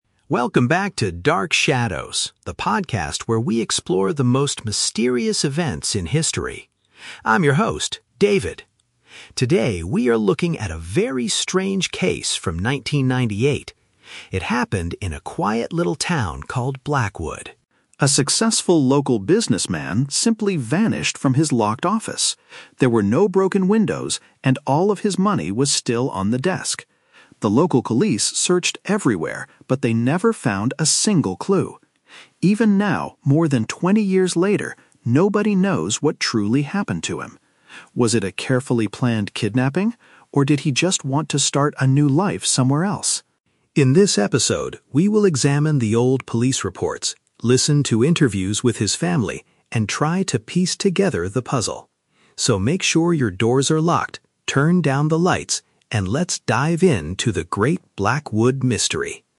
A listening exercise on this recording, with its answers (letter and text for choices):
Listen to the introduction of a podcast and choose the correct answer (A, B, or C) for each question.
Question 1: What is the main subject of today's podcast episode?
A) A story about a man who disappeared without a trace.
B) A violent robbery at a successful local business.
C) A history lesson about the town of Blackwood.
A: A) A story about a man who disappeared without a trace.

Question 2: What was strange about the crime scene?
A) The windows in the room were completely broken.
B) The police found a secret message on the desk.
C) The man's cash was left behind in the room.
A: C) The man's cash was left behind in the room.

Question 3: What will the host do later in the episode?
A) Interview the police officers who successfully solved the crime.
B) Review official documents and talk to the man's relatives.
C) Travel to the town of Blackwood to look for new evidence.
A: B) Review official documents and talk to the man's relatives.

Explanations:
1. The Key: The host says a businessman "simply vanished." To vanish means to disappear without a trace. The Trap (B): The host mentions "money" and a "business", but it was not a robbery because all the money was left on the desk. Plausible but not mentioned (C): The story takes place in the town of Blackwood, but this is a crime podcast, not a general history lesson about the town.
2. The Key: The host states that "all of his money was still on the desk." Money on the desk means his cash was left behind. The Trap (A): The audio mentions "broken windows," but the host explicitly says there were no broken windows. The Trap (B): The host mentions the "desk," but says the police "never found a single clue" (they did not find a secret message).
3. The Key: The host promises to "examine the old police reports" (review official documents) and "listen to interviews with his family" (talk to relatives). The Trap (A): The "police" are mentioned, but this is an unsolved mystery ("nobody knows what truly happened to him"), so no one successfully solved it. Plausible but not mentioned (C): Traveling to the town is something a podcaster might do, but David does not say he will travel there in this episode.

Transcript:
Podcast Host: Welcome back to "Dark Shadows," the podcast where we explore the most mysterious events in history. I'm your host, David. Today, we are looking at a very strange case from 1998. It happened in a quiet little town called Blackwood.
A successful local businessman simply vanished from his locked office. There were no broken windows, and all of his money was still on the desk. The local police searched everywhere, but they never found a single clue. Even now, more than twenty years later, nobody knows what truly happened to him. Was it a carefully planned kidnapping? Or did he just want to start a new life somewhere else?
In this episode, we will examine the old police reports, listen to interviews with his family, and try to piece together the puzzle. So, make sure your doors are locked, turn down the lights, and let's dive into the great Blackwood mystery.